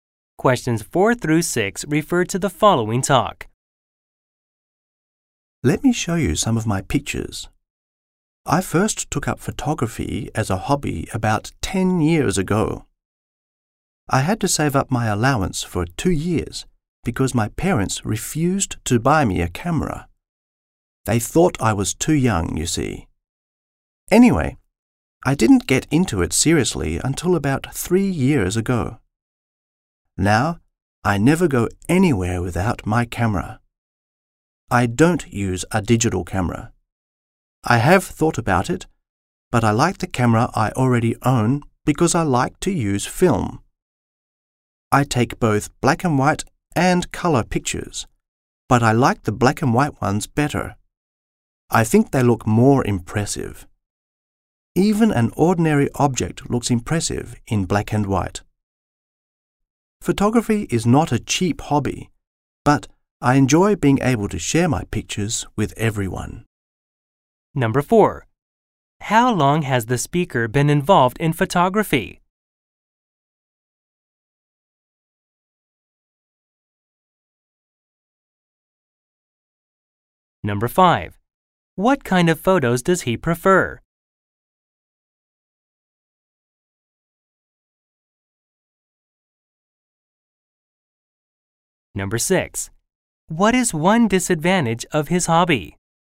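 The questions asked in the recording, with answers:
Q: How long has the speaker been involved in photography?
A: About 10 years

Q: What kind of photos does he prefer?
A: Black and white photos

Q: What is one disadvantage of his hobby?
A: It is not cheap.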